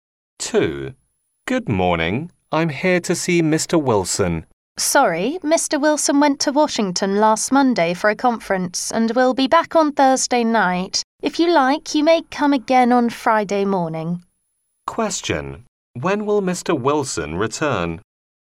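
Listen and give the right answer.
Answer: On Thursday night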